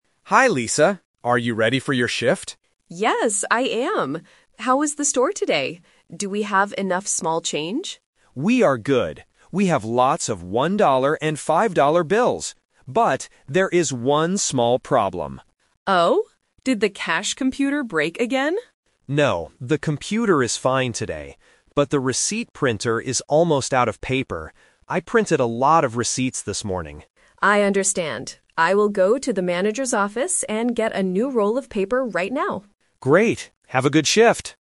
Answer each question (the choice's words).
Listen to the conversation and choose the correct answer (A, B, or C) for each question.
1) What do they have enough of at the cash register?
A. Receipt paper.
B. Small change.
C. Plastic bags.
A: Small change.

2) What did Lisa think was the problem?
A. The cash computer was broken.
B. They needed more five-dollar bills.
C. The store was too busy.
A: The cash computer was broken.

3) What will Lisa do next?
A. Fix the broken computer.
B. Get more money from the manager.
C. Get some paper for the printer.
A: Get some paper for the printer.

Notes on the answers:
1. When Lisa asks "Do we have enough small change?", David answers "We are good. We have lots of one-dollar and five-dollar bills." Why the trap is wrong: Option (A) is the trap. They are actually running out of receipt paper, so they do NOT have enough of it. Option (C) is a plausible item at a checkout, but it was not mentioned.
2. When David says there is a problem, Lisa immediately asks, "Did the cash computer break again?" Why the trap is wrong: Option (B) is incorrect because David just said they have lots of bills. Option (C) is not mentioned as a problem, although David said he printed a lot of receipts.
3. Option (A) is the trap because the computer was mentioned, but David confirmed "the computer is fine today." Option (B) is a trap because she is going to the manager's office, but for paper, not money.

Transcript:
David: Hi Lisa, are you ready for your shift?
Lisa: Yes, I am! How was the store today? Do we have enough small change?
David: We are good. We have lots of one-dollar and five-dollar bills. But, there is one small problem.
Lisa: Oh? Did the cash computer break again?
David: No, the computer is fine today. But the receipt printer is almost out of paper. I printed a lot of receipts this morning.
Lisa: I understand. I will go to the manager's office and get a new roll of paper right now.